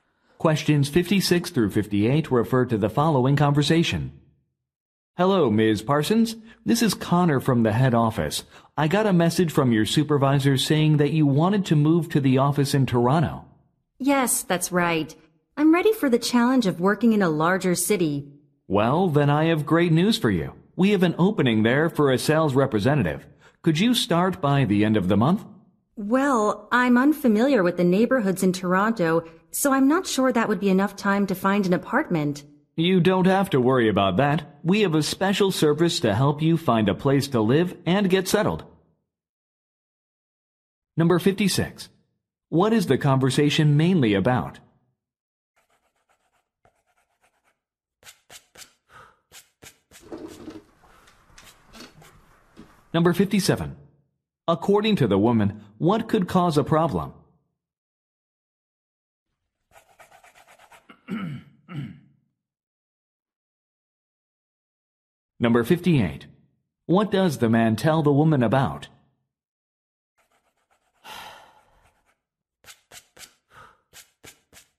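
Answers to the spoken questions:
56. A transfer to the Toronto office
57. Finding an apartment in time
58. A relocation service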